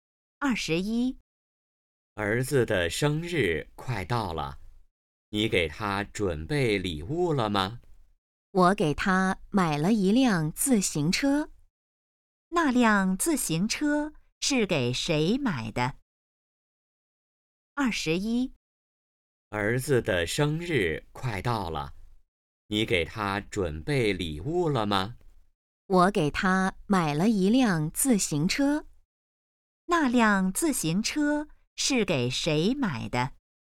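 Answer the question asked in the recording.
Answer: 儿子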